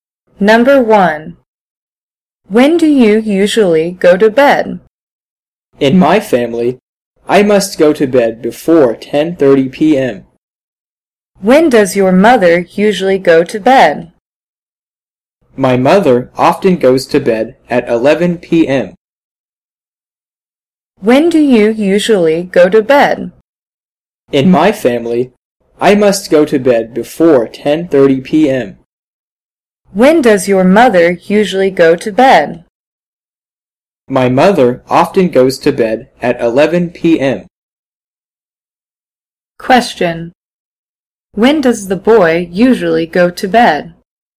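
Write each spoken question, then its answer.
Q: When does the boy usually go to bed?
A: Before 10:30 p.m.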